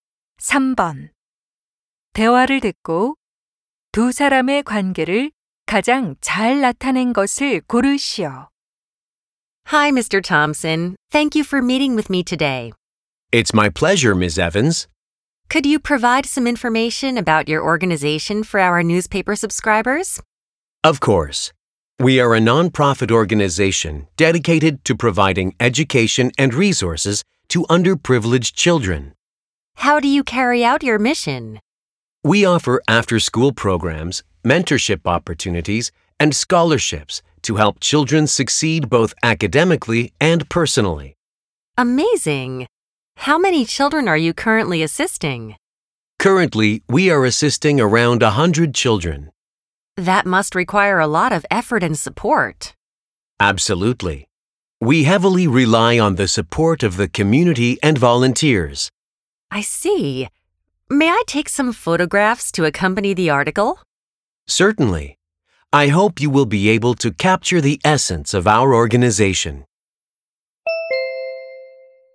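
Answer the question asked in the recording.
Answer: 신문 기자 - 비영리 단체 대표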